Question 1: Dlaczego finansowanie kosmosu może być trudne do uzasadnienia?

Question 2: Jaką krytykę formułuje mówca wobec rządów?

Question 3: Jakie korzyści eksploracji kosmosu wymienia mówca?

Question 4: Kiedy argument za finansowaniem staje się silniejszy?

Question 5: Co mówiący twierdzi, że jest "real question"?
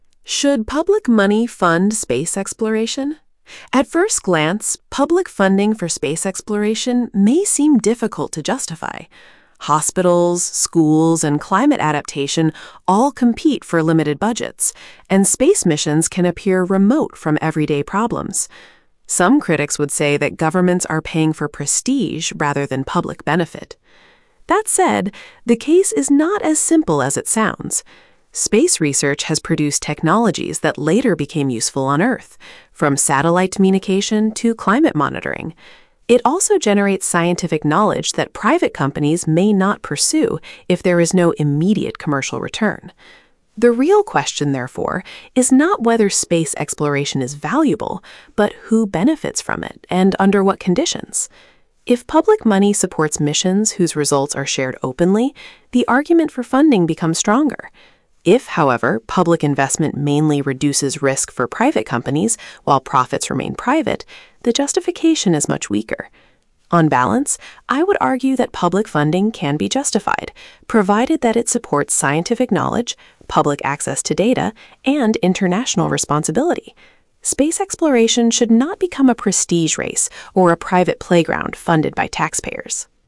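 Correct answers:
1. Bo szpitale, szkoły i adaptacja klimatyczna konkurują o ograniczone budżety, a misje kosmiczne wydają się odległe od codziennych problemów.
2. Krytycy twierdzą, że rządy płacą za prestiż, a nie za korzyść publiczną.
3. Technologie przydatne na Ziemi (łączność satelitarna, monitoring klimatu) oraz wiedzę naukową, której firmy prywatne mogłyby nie zdobywać.
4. Gdy wyniki misji finansowanych publicznie są otwarcie udostępniane.
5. Nie to, czy eksploracja kosmosu jest wartościowa, lecz kto na niej korzysta i na jakich warunkach.

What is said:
At first glance, public funding for space exploration may seem difficult to justify. Hospitals, schools and climate adaptation all compete for limited budgets, and space missions can appear remote from everyday problems. Some critics would say that governments are paying for prestige rather than public benefit.
That said, the case is not as simple as it sounds. 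Space research has produced technologies that later became useful on Earth, from satellite communication to climate monitoring. It also generates scientific knowledge that private companies may not pursue if there is no immediate commercial return.
The real question, therefore, is not whether space exploration is valuable, but who benefits from it and under what conditions. If public money supports missions whose results are shared openly, the argument for funding becomes stronger. If, however, public investment mainly reduces risk for private companies while profits remain private, the justification is much weaker.
On balance, I would argue that public funding can be justified, provided that it supports scientific knowledge, public access to data and international responsibility. Space exploration should not become a prestige race or a private playground funded by taxpayers.

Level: B2+/C1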